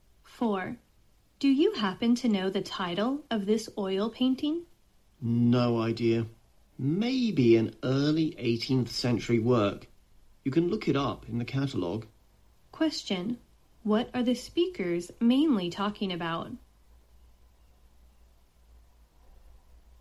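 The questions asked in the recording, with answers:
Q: What are the speakers mainly talking about?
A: An oil painting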